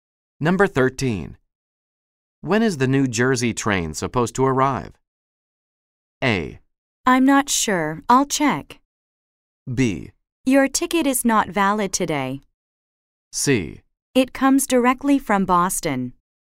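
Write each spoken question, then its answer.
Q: When is the New Jersey train supposed to arrive?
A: A: I'm not sure. I'll check.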